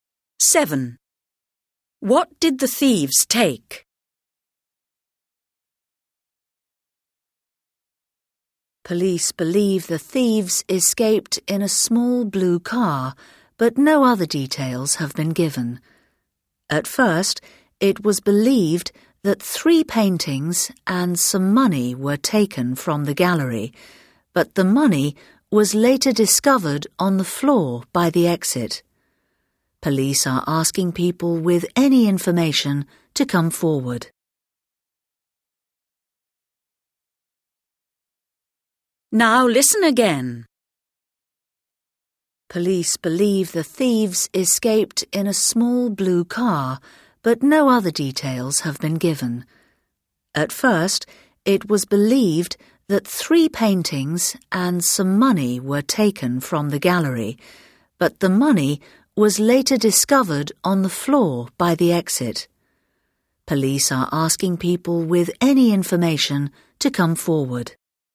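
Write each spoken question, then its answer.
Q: What did the thieves take?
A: Three paintings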